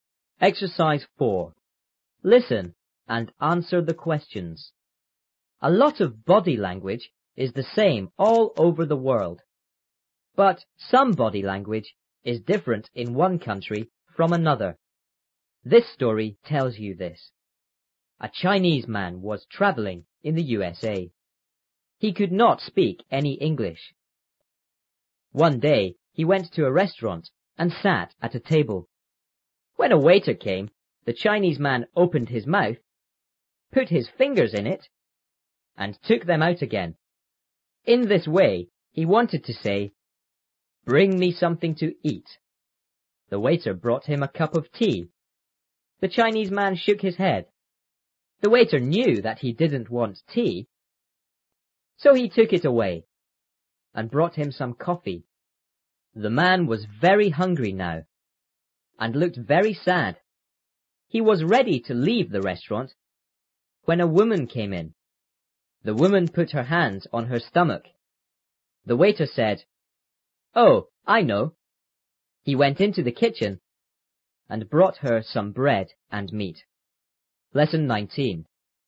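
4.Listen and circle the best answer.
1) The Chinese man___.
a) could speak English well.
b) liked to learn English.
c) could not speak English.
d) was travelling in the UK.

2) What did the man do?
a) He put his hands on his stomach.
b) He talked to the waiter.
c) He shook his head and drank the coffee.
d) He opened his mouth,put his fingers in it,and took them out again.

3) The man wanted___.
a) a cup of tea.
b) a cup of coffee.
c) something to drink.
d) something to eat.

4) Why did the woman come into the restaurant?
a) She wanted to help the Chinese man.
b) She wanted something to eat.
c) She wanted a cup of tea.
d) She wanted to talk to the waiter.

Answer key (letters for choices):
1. c
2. d
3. d
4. b

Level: 初中英语广州版3B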